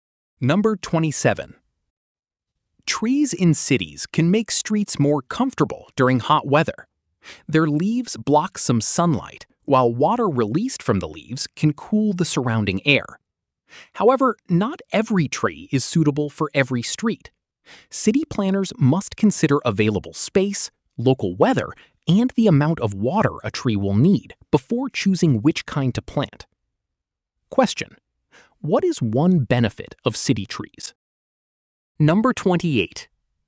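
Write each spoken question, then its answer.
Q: what is one benefit of city trees?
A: They make streets cooler in hot weather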